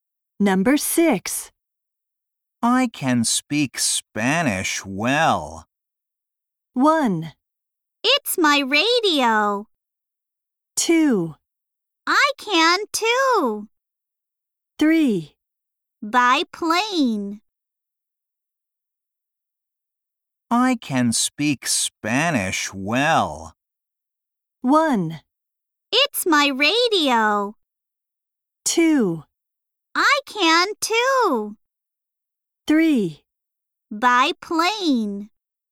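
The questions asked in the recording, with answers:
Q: I can speak Spanish well.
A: 2: I can too.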